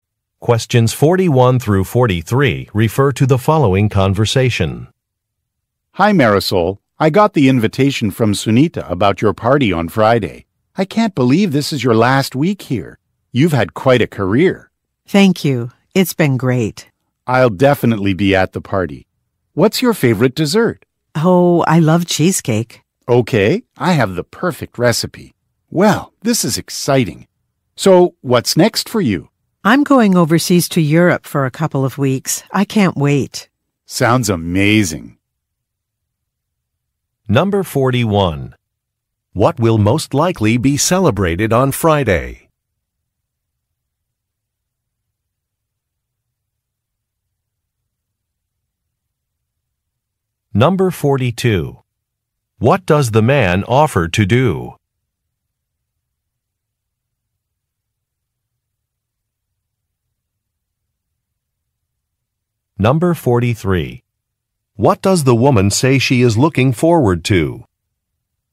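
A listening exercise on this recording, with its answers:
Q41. What will most likely be celebrated on Friday?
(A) A promotion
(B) A retirement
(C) A graduation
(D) A business deal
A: A retirement

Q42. What does the man offer to do?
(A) Look for a receipt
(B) Send invitations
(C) Reserve a room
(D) Prepare a dessert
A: Prepare a dessert

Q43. What does the woman say she is looking forward to?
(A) Visiting her family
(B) Moving to a different city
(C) Traveling internationally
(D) Organizing a team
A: Traveling internationally

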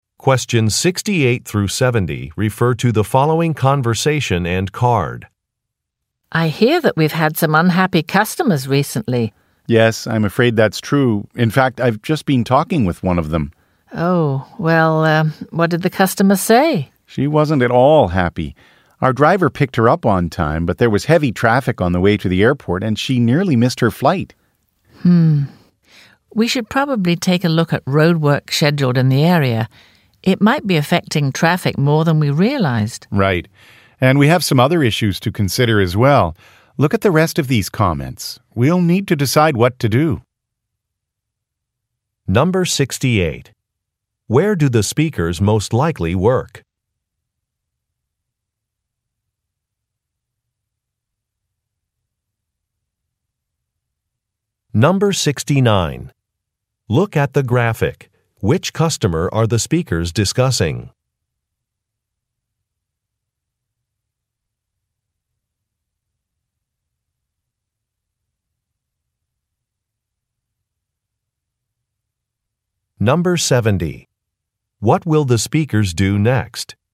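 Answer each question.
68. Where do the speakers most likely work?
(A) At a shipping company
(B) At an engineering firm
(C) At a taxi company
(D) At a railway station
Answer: At a taxi company

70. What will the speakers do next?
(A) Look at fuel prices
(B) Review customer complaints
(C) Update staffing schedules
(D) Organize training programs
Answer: Review customer complaints

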